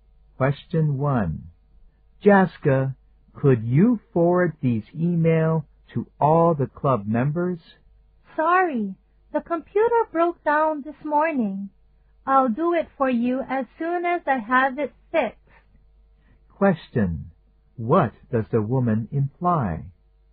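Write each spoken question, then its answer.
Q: What does the woman imply?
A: She can't forward the emails until her computer is fixed.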